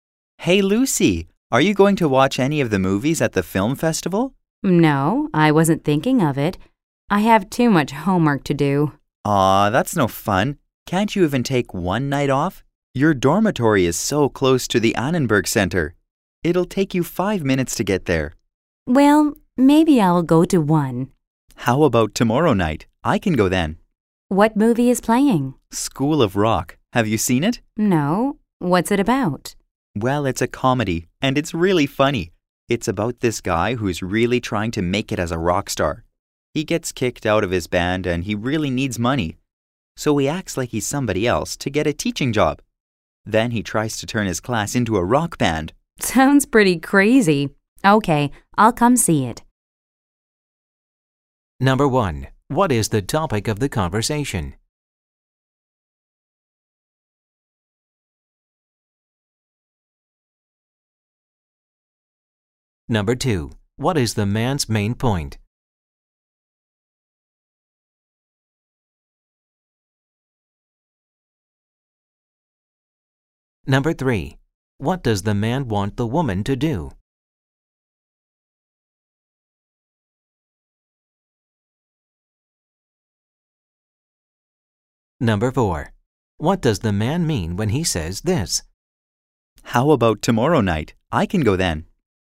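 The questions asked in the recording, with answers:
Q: What is the topic of the conversation?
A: Going to see a movie at the film festival

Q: What does the man want the woman to do?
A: Go to see a movie (School of Rock) at the film festival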